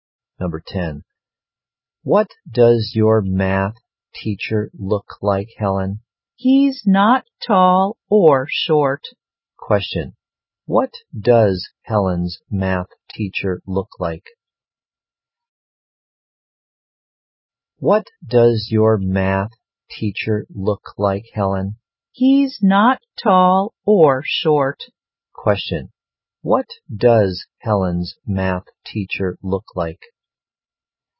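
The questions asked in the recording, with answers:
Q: Question. What does Helen's math teacher look like?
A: Of medium height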